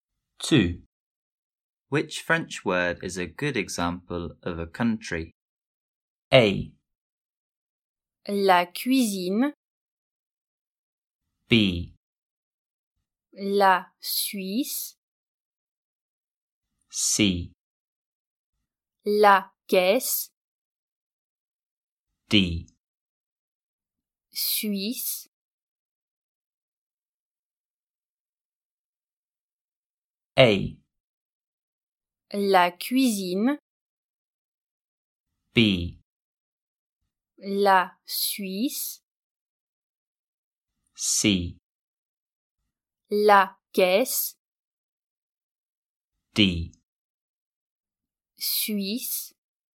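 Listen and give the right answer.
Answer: B: La Suisse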